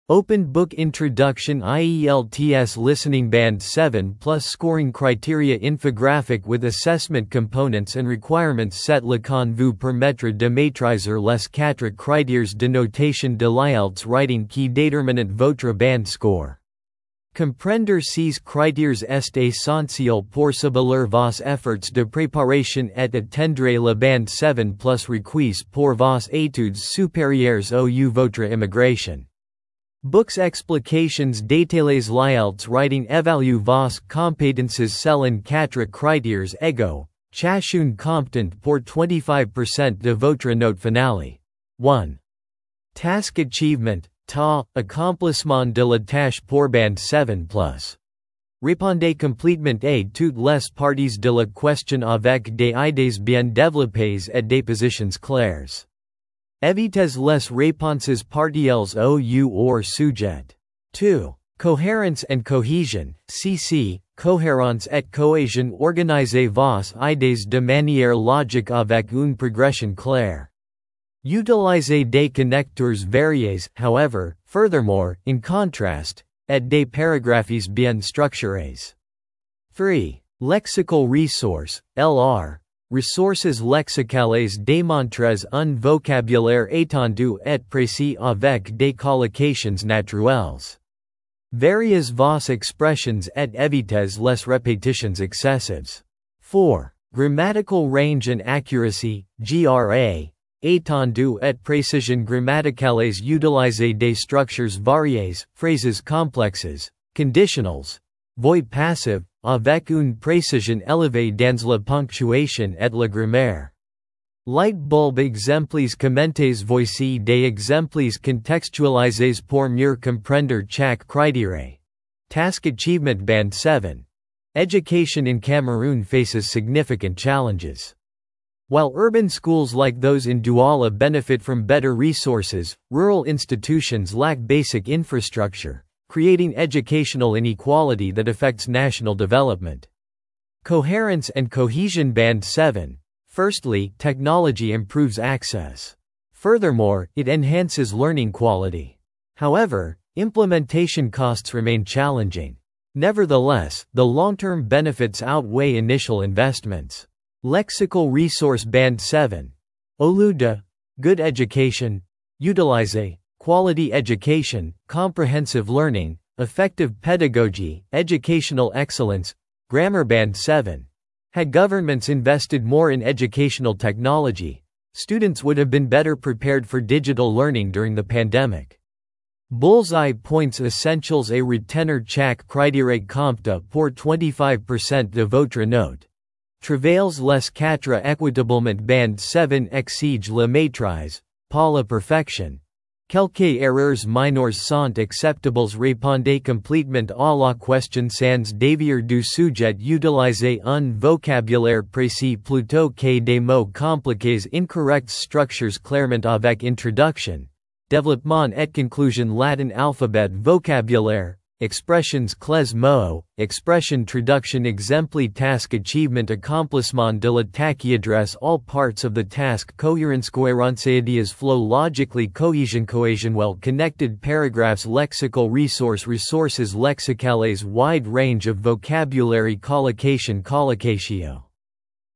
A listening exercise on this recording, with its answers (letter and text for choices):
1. Pour obtenir Band 7 en Task Achievement, vous devez :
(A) Écrire beaucoup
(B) Répondre complètement à la question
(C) Utiliser des mots difficiles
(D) Éviter les exemples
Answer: (B) Répondre complètement à la question

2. Quel critère évalue l'organisation de vos idées ?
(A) Coherence & Cohesion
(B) Task Achievement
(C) Lexical Resource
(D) Grammar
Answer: (A) Coherence & Cohesion

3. Combien de critères déterminent votre note Writing ?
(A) 2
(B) 3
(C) 4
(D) 5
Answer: (C) 4

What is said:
📖 Introduction
IELTS Listening Band 7+ scoring criteria infographic with assessment components and requirements
Cette leçon vous permettra de maîtriser les quatre critères de notation de l'IELTS Writing qui déterminent votre Band Score. Comprendre ces critères est essentiel pour cibler vos efforts de préparation et atteindre le Band 7+ requis pour vos études supérieures ou votre immigration.
📚 Explications détaillées
L'IELTS Writing évalue vos compétences selon quatre critères égaux, chacun comptant pour 25% de votre note finale :
1. Task Achievement (TA) - Accomplissement de la tâche
Pour Band 7+ : Répondez complètement à toutes les parties de la question avec des idées bien développées et des positions claires. Évitez les réponses partielles ou hors-sujet.
2. Coherence & Cohesion (CC) - Cohérence et cohésion
Organisez vos idées de manière logique avec une progression claire. Utilisez des connecteurs variés (However, Furthermore, In contrast) et des paragraphes bien structurés.
3. Lexical Resource (LR) - Ressources lexicales
Démontrez un vocabulaire étendu et précis avec des collocations naturelles. Variez vos expressions et évitez les répétitions excessives.
4. Grammatical Range & Accuracy (GRA) - Étendue et précision grammaticales
Utilisez des structures variées (phrases complexes, conditionnels, voix passive) avec une précision élevée dans la ponctuation et la grammaire.
Voici des exemples contextualisés pour mieux comprendre chaque critère :
Task Achievement Band 7 : "Education in Cameroon faces significant challenges. While urban schools like those in Douala benefit from better resources, rural institutions lack basic infrastructure, creating educational inequality that affects national development."
Coherence & Cohesion Band 7 : "Firstly, technology improves access. Furthermore, it enhances learning quality. However, implementation costs remain challenging. Nevertheless, the long-term benefits outweigh initial investments."
Lexical Resource Band 7 : Au lieu de "good education", utilisez "quality education, comprehensive learning, effective pedagogy, educational excellence"
Grammar Band 7 : "Had governments invested more in educational technology, students would have been better prepared for digital learning during the pandemic."
🎯 Points essentiels à retenir
Chaque critère compte pour 25% de votre note - travaillez les quatre équitablement
Band 7 exige la maîtrise, pas la perfection - quelques erreurs mineures sont acceptables
Répondez complètement à la question sans dévier du sujet
Utilisez un vocabulaire précis plutôt que des mots compliqués incorrects
Structurez clairement avec introduction, développement et conclusion
🔤 Vocabulaire / Expressions clés
Traduction
Exemple
Address all parts of the task
Coherence